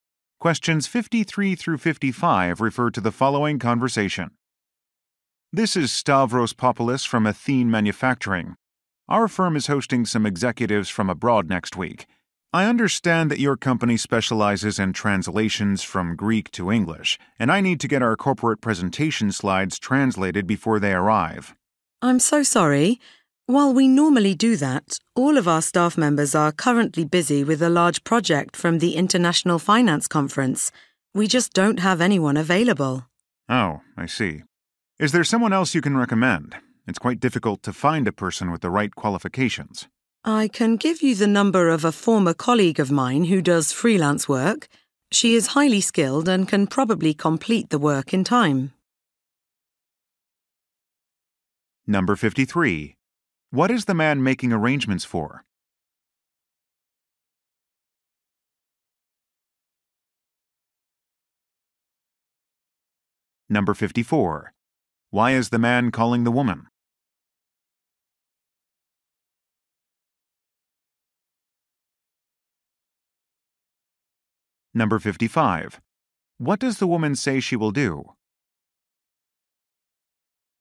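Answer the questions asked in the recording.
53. A visit by executives from abroad.
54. To get presentation slides translated into English.
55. Give him the number of a freelance translator.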